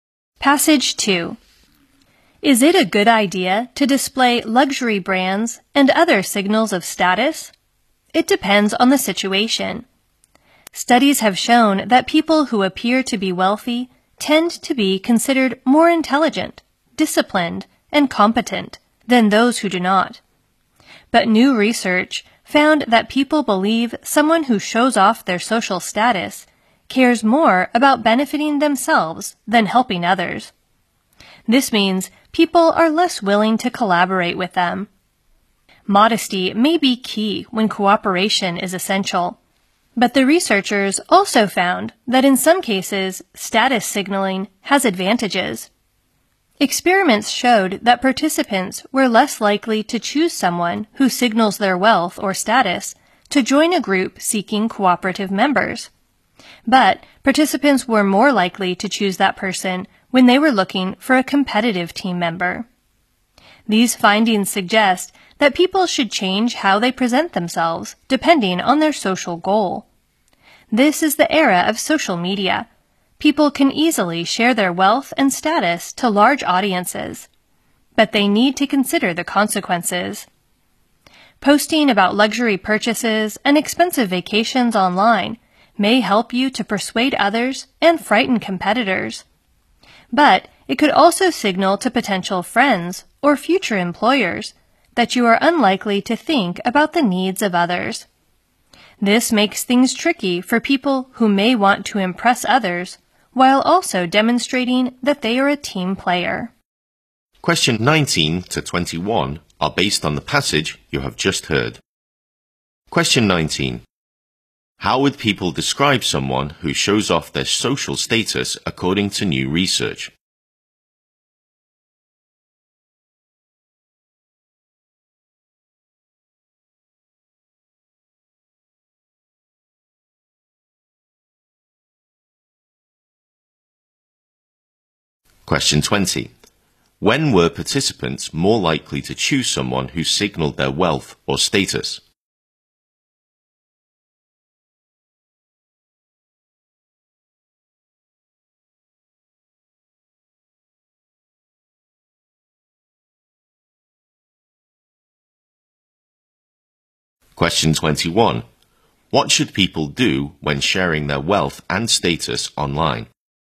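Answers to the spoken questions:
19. As caring more about helping themselves than helping others
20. When they wanted a competitive team member
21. Think about the consequences.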